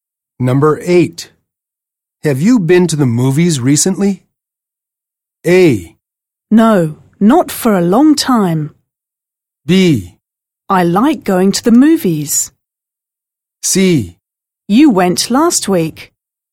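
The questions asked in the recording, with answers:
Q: Have you been to the movies recently?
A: A: No, not for a long time.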